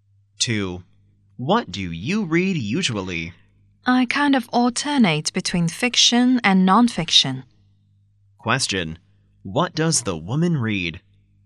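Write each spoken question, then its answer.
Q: What does the woman read?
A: Both fiction and non-fiction, alternately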